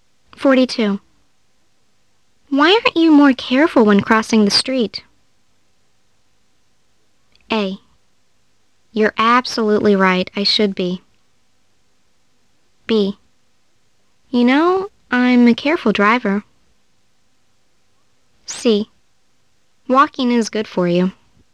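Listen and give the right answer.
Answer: A: You're absolutely right, I should be.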